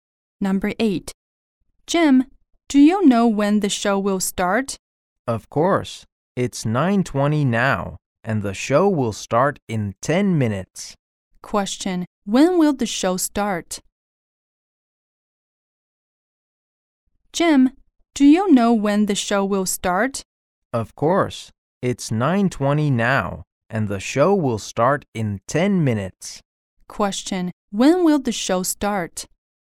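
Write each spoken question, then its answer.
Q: Question: When will the show start?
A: At 9:30.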